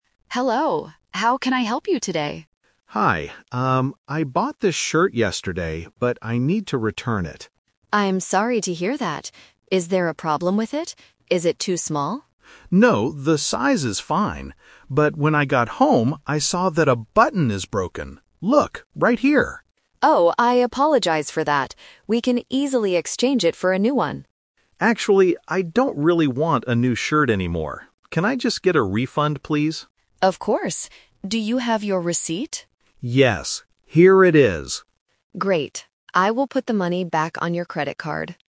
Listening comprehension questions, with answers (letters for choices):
Listen to the conversation between a customer and a customer service assistant. Choose the correct answer (A, B, or C).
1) Why is the man returning the shirt?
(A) It is too small.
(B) It has a broken button.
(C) It is the wrong color.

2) What does the assistant offer to do first?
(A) Give him his money back.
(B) Exchange it for a new shirt.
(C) Fix the broken button for him.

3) What does the man finally decide to do?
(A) Get a refund.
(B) Take a new shirt.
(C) Buy a different item.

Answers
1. B
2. B
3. A

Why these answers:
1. Mark clearly states his problem: "I saw that a button is broken." Option (A) is a trap; Jessica asks if it is too small, but Mark says, "No, the size is fine." Option (C) is a plausible reason for returning clothes, but it is not mentioned.
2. When Jessica sees the broken button, her first solution is: "We can easily exchange it for a new one." Option (A) is what happens at the end. Option (C) is a plausible service in some stores, but it is not mentioned here.
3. This is "The Twist." Jessica offers an exchange (Option B - trap), but Mark rejects it by saying, "Actually, I don't really want a new shirt anymore." Instead, he asks, "Can I just get a refund, please?" A refund means getting your money back. Option (C) is not mentioned.

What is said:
Jessica: Hello, how can I help you today?
Mark: Hi. Um, I bought this shirt yesterday, but I need to return it.
Jessica: I'm sorry to hear that. Is there a problem with it? Is it too small?
Mark: No, the size is fine. But when I got home, I saw that a button is broken. Look, right here.
Jessica: Oh, I apologize for that. We can easily exchange it for a new one.
Mark: Actually, I don't really want a new shirt anymore. Can I just get a refund, please?
Jessica: Of course. Do you have your receipt?
Mark: Yes, here it is.
Jessica: Great. I will put the money back on your credit card.